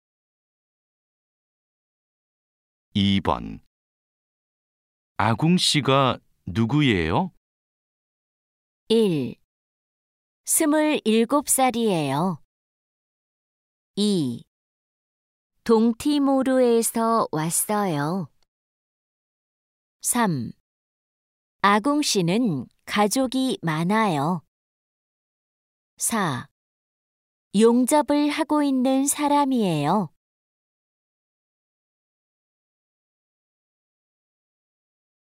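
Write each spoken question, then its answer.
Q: 아궁 씨가 누구예요?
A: 4: 용접을 하고 있는 사람이에요.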